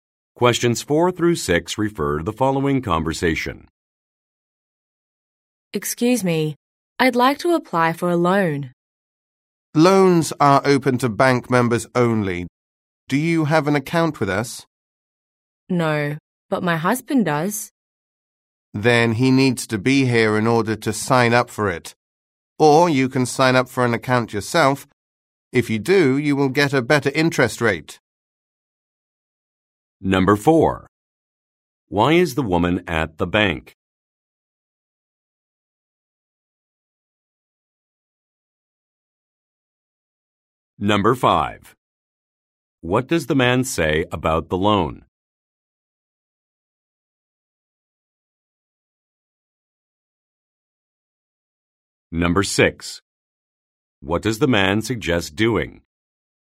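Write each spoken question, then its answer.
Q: Why is the woman at the bank?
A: To apply for a loan

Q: What does the man say about the loan?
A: It is open to bank members only

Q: What does the man suggest doing?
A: Signing up for an account herself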